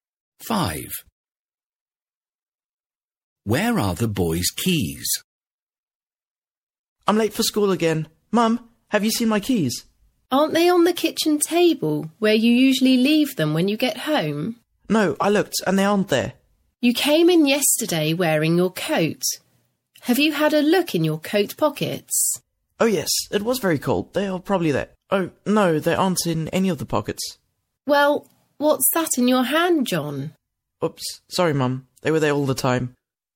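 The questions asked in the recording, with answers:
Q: Where are the boys' keys?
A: In his hand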